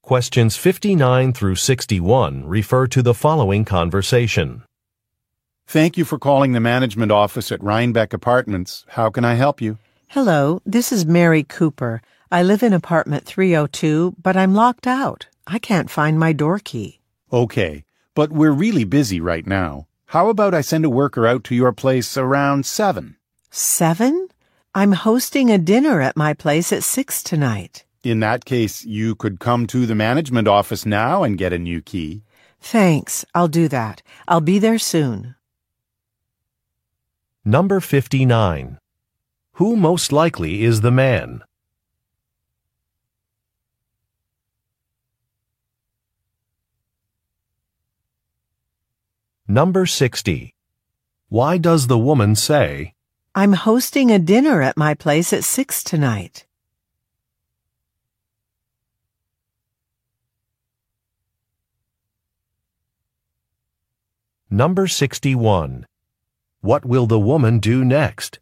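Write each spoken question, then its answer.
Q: Who most likely is the man?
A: An employee at the apartment management office

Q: Why does the woman say,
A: To say that 7 o'clock is too late for her

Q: What will the woman do next?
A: Go to the management office to get a new key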